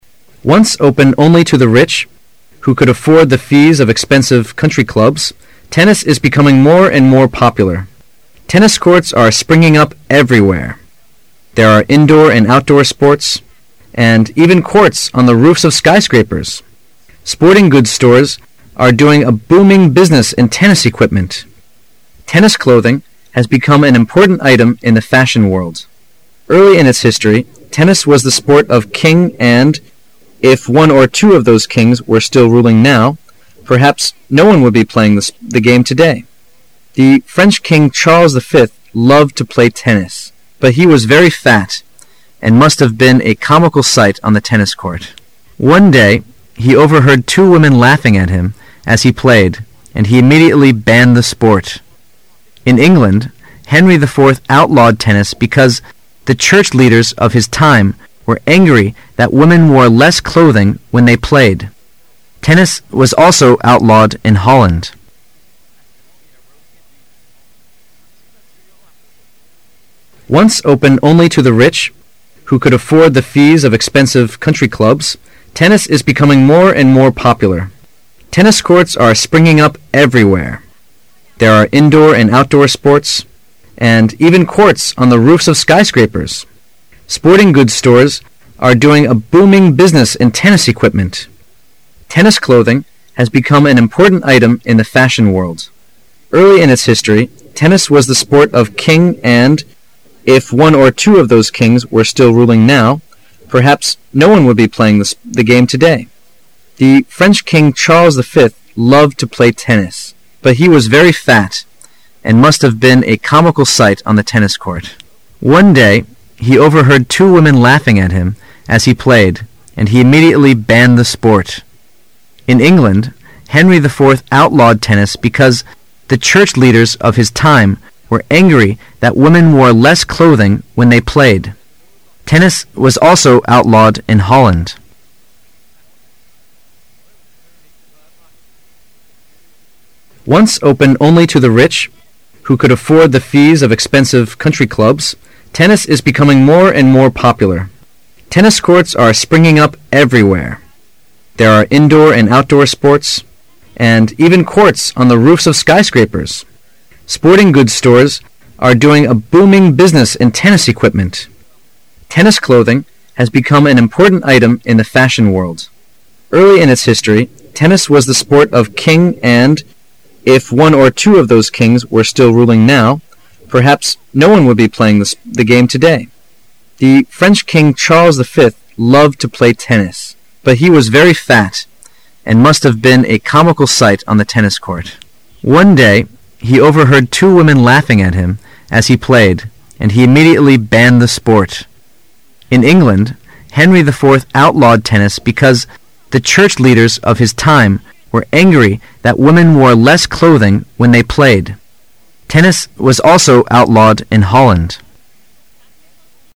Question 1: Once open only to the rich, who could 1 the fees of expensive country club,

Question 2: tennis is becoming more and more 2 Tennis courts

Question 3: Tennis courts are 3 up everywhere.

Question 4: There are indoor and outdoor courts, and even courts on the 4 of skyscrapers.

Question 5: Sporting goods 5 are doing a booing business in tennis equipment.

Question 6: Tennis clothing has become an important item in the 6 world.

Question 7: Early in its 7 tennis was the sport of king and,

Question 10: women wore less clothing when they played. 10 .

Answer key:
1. afford
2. popular
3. springing
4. roofs
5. stores
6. fashion
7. history
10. Tennis was also outlawed in Holland.

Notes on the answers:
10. [试题分析]本题考查考生的词汇量。 [关键词句]outlaw,Holland [详细解答]上文讲到法国国王下令取缔这个运动项目。在英国,由于妇女打网球时穿着较少,英国国王也禁止了此项目。此句为补充说明,在荷兰,网球也被禁止了。此句可写为:People were not allowed to play tennis in Holland.

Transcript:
[解析] 15-24 Once open only to the rich, who could (15) afford the fees of expensive country club, tennis is becoming more and more (16) popular. Tennis courts are (17) springing up everywhere. There are indoor and outdoor courts, and even courts on the (18) roofs of skyscrapers. Sporting goods (19) stores are doing a booing business in tennis equipment. Tennis clothing has become an important item in the (20) fashion world. Early in its (21) history tennis was the sport of king and, (22) if one or two of those kings were still ruling now, perhaps no one would be playing the game today. The French King Charles V loved to play tennis, but he was very fat and must have been a comical sight on the tennis court. (23) One day he overheard two women laughing at him as he played, and he immediately banned the sport. In England, Henry IV outlawed tennis because the church leaders of his time were angry that women wore less clothing when they played.